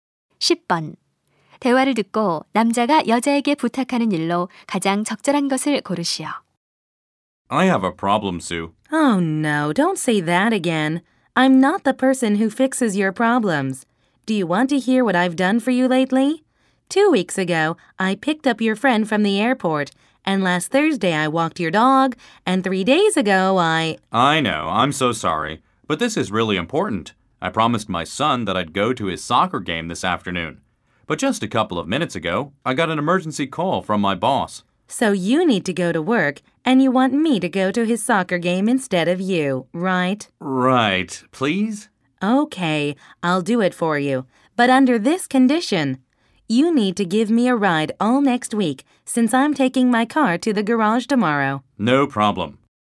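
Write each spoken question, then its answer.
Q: 대화를 듣고 남자가 여자에게 부탁하는 일로 가장 적절한 것을 고르시오.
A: 아들의 축구 경기에 대신 가 달라는 것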